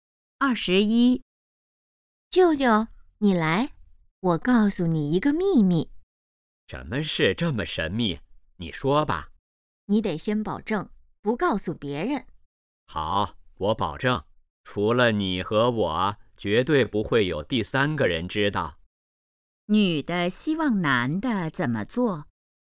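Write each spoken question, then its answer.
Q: 女的希望男的怎么做?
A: 保守秘密,不告诉别人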